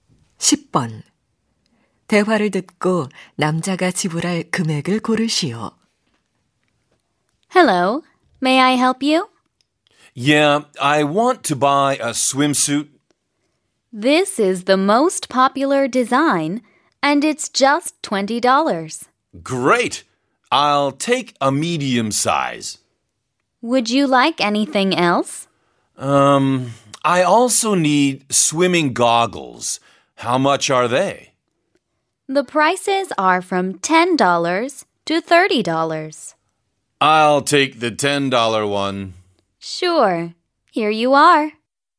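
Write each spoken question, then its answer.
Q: 대화를 듣고 남자가 지불할 금액을 고르시오.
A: 30달러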